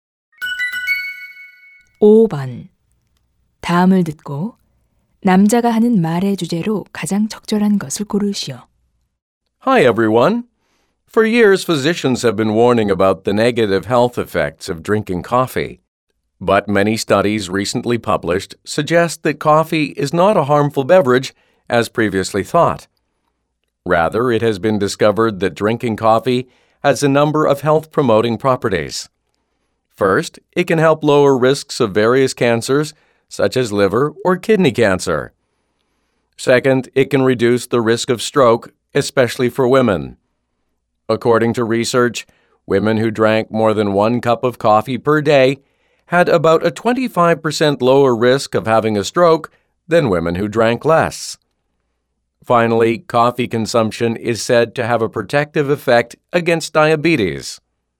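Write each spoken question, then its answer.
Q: 다음을 듣고 남자가 하는 말의 주제로 가장 적절한 것을 고르시오.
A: 커피를 마시는 것의 건강상 이점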